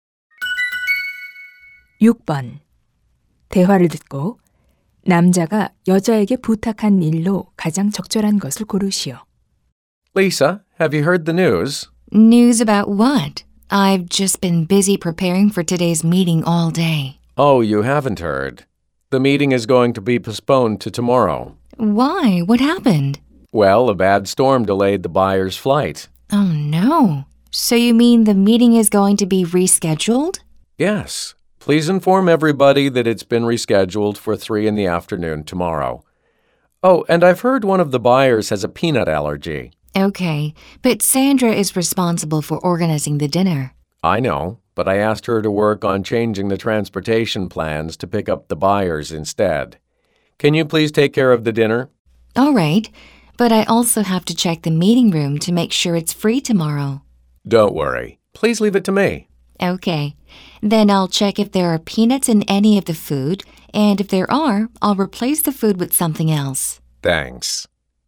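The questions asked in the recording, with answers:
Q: 대화를 듣고 남자가 여자에게 부탁한 일로 가장 적절한 것을 고르시오.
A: 바이어 저녁 식사 준비하기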